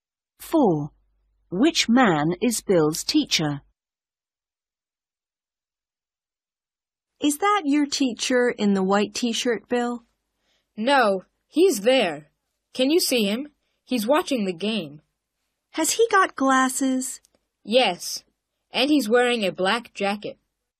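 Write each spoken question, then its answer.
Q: Which man is Bill's teacher?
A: the man watching the game with glasses and a black jacket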